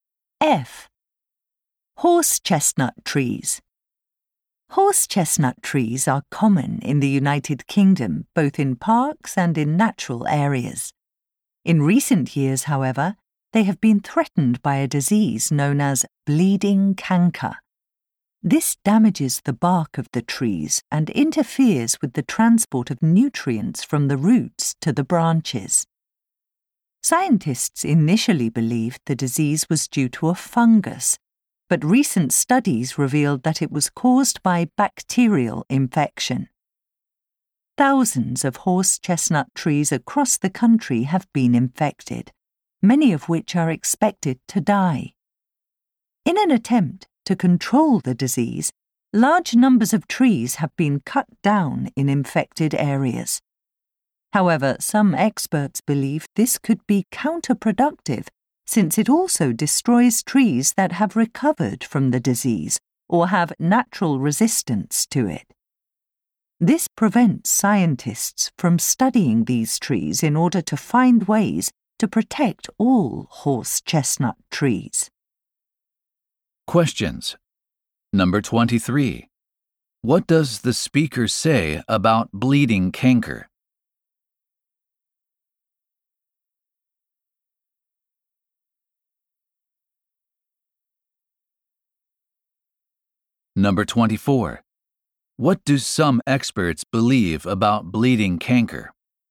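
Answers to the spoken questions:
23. It is caused by bacteria, not a fungus as first thought
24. Cutting down trees could be counterproductive because it destroys resistant or recovered trees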